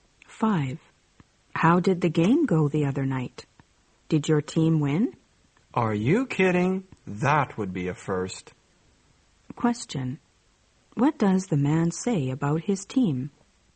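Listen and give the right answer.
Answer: His team has never won; they lost.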